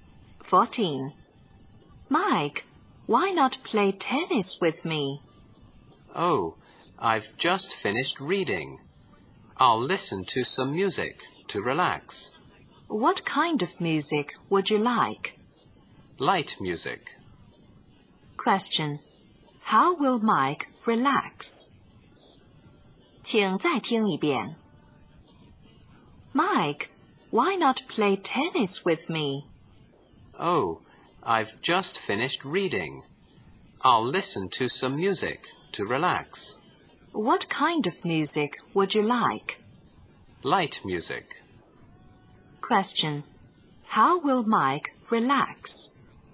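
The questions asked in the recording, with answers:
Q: How will Mike relax?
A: By listening to light music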